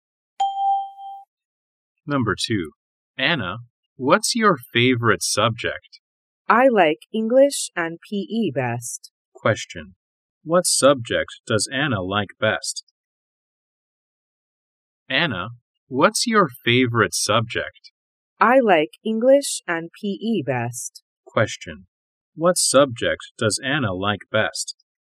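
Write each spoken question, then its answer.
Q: What subject does Anna like best?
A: English and PE.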